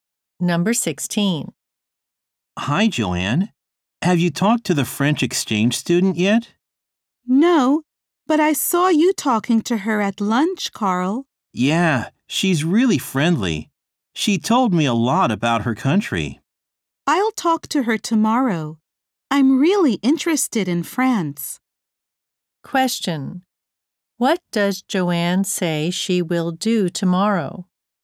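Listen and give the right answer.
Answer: Talk to the French exchange student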